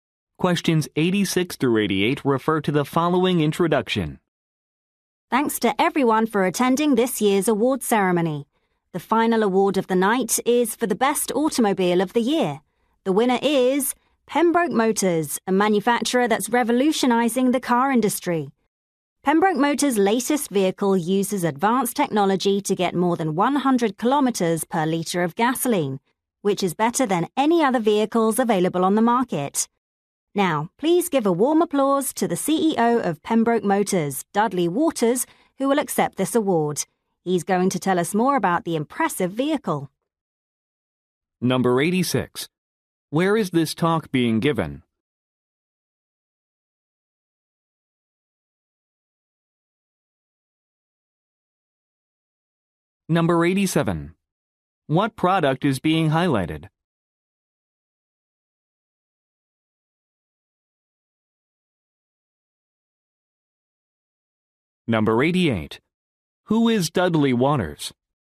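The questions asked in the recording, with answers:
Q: Where is this talk being given?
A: At an award ceremony

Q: What product is being highlighted?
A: A fuel-efficient car

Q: Who is Dudley Waters?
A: The CEO of Pembroke Motors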